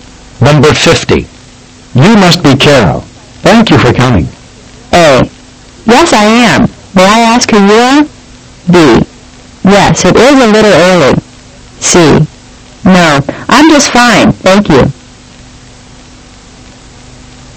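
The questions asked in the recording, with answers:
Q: You must be Carol. Thank you for coming.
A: A: Yes, I am. May I ask who you are?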